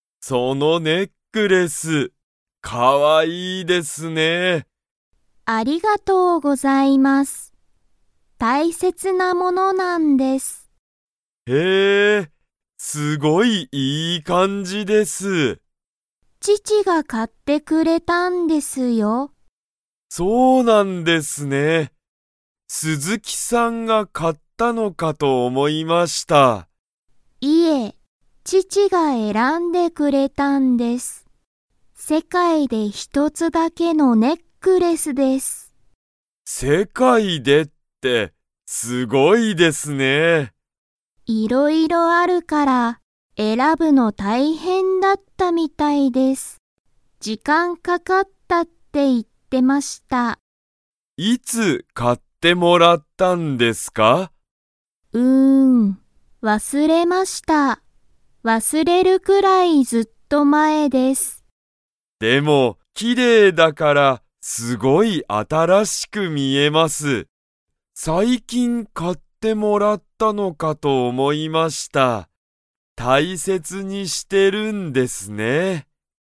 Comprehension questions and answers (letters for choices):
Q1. 鈴木すずきさんのネックレスは、誰だれが買かいましたか?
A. 鈴木すずきさん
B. 佐藤さとうさん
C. お父とうさん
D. お母かあさん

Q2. ネックレスは 見みえる。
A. 新あたらしく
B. 古ふるく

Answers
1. C
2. A